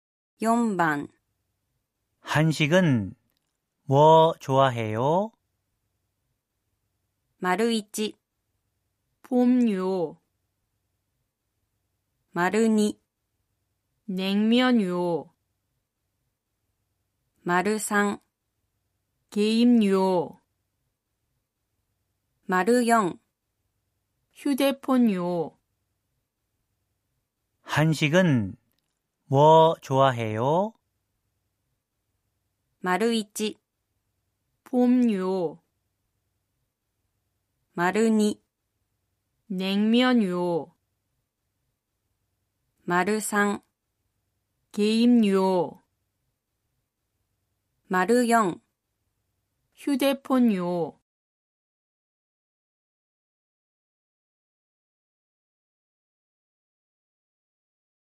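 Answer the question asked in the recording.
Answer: 2: 냉면요.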